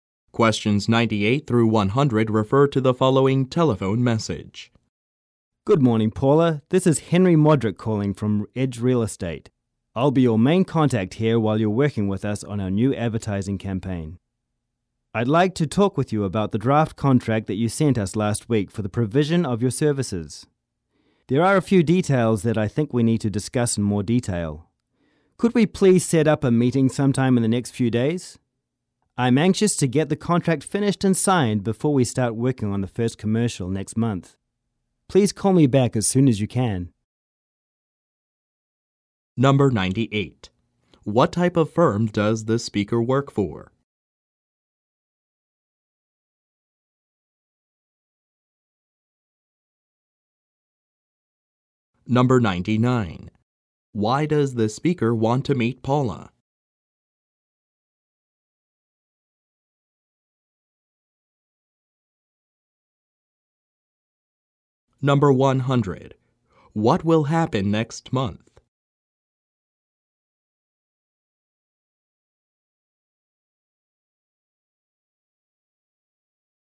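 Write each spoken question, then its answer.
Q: What type of firm does this speaker work for?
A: A real estate firm

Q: Why does the speaker want to meet Paula?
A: To discuss details of the draft contract

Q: What will happen next month?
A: Work on the first commercial will start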